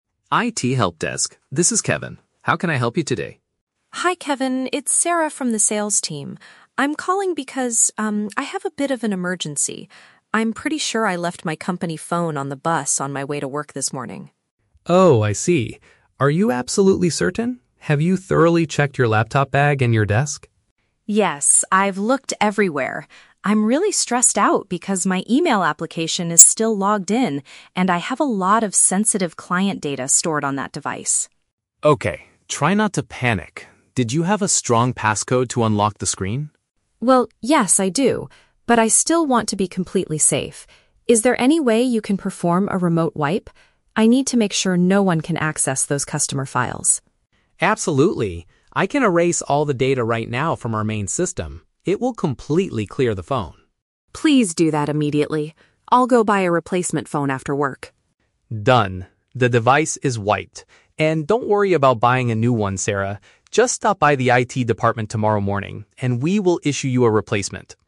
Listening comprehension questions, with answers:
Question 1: Why is Sarah calling the IT department?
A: She misplaced her work mobile while commuting.

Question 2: What is Sarah's main concern about the situation?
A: Someone might read confidential customer information.

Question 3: How does the IT worker, Kevin, resolve the problem?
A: He deletes everything on the phone from a distance.

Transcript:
Kevin: IT Helpdesk, this is Kevin. How can I help you today?
Sarah: Hi Kevin, it's Sarah from the Sales team. I'm calling because, um, I have a bit of an emergency. I'm pretty sure I left my company phone on the bus on my way to work this morning.
Kevin: Oh, I see. Are you absolutely certain? Have you thoroughly checked your laptop bag and your desk?
Sarah: Yes, I've looked everywhere. I'm really stressed out because my email application is still logged in, and I have a lot of sensitive client data stored on that device.
Kevin: Okay, try not to panic. Did you have a strong passcode to unlock the screen?
Sarah: Well, yes, I do. But I still want to be completely safe. Is there any way you can perform a remote wipe? I need to make sure no one can access those customer files.
Kevin: Absolutely. I can erase all the data right now from our main system. It will completely clear the phone.
Sarah: Please do that immediately. I'll go buy a replacement phone after work.
Kevin: Done. The device is wiped. And don't worry about buying a new one, Sarah. Just stop by the IT department tomorrow morning, and we will issue you a replacement.